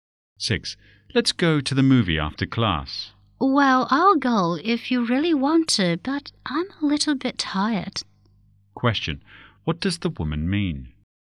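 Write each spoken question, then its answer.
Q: What does the woman mean?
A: She will go reluctantly because she is tired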